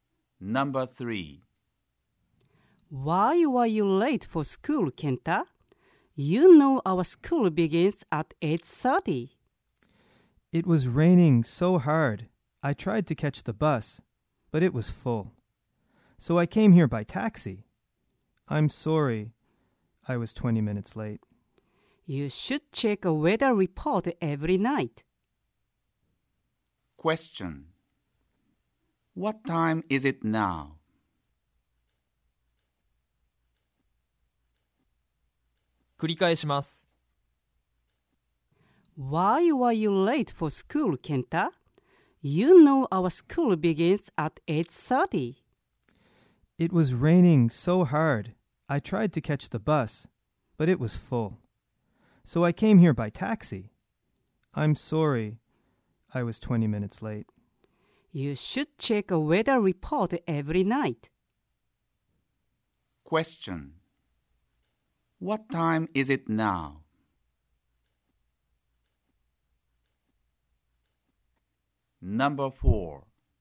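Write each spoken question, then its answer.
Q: What time is it now?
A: 8:50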